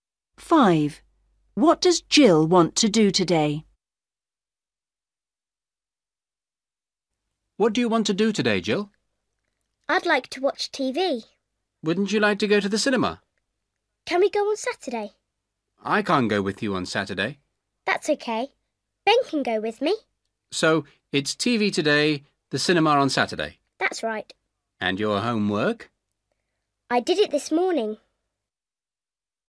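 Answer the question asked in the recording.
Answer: Watch TV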